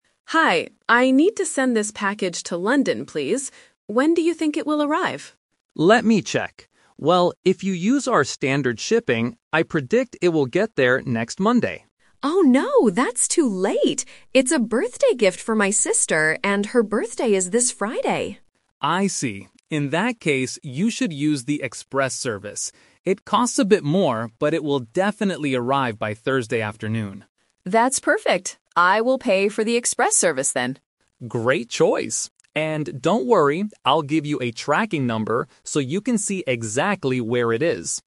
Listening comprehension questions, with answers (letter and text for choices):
Listen to the conversation between a customer and a postal worker. Choose the correct answer (A, B, or C).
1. Why does the customer need the package to arrive quickly?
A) Because she is traveling to London on Friday.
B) Because it is a birthday present for her sister.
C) Because she wants to save money on shipping.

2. When will the package arrive if they use standard shipping?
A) Thursday afternoon.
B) Friday morning.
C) Next Monday.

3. What does the customer finally decide to do?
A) She pays extra for the express service.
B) She uses the standard shipping.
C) She decides not to send the package.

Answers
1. B) Because it is a birthday present for her sister.
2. C) Next Monday.
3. A) She pays extra for the express service.

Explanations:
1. The customer says, "It's a birthday gift for my sister, and her birthday is this Friday."
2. Option (A) is a "Number/Time Trap" – Thursday afternoon is the prediction for the express service, not the standard one. Option (B) is the day of the birthday.
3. The customer says, "That's perfect. I will pay for the express service, then."

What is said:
Customer: Hi, I need to send this package to London, please. When do you think it will arrive?
Postal Worker: Let me check. Well, if you use our standard shipping, I predict it will get there next Monday.
Customer: Oh no, that's too late! It's a birthday gift for my sister, and her birthday is this Friday.
Postal Worker: I see. In that case, you should use the express service. It costs a bit more, but it will definitely arrive by Thursday afternoon.
Customer: That's perfect. I will pay for the express service, then.
Postal Worker: Great choice. And don't worry, I'll give you a tracking number so you can see exactly where it is.